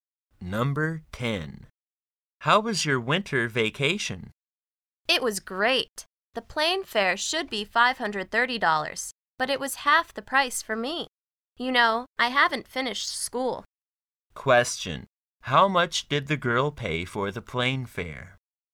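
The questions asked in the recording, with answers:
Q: How much did the girl pay for the plane fare?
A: $265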